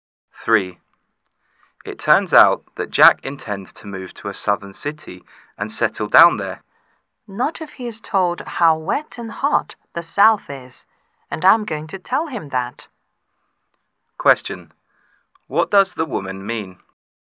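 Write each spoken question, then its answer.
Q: What does the woman mean?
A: Jack will probably change his mind once he hears how wet and hot the South is.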